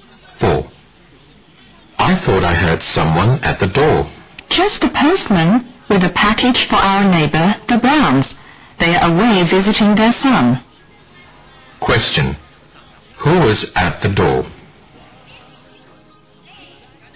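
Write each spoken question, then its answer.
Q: Who was at the door?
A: The postman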